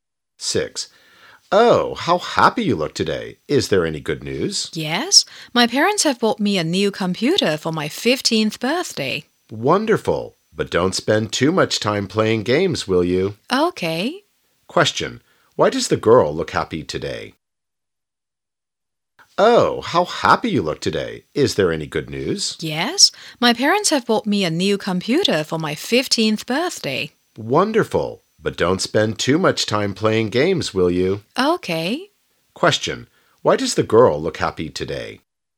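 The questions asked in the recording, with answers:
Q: Why does the girl look happy today?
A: Her parents bought her a new computer for her 15th birthday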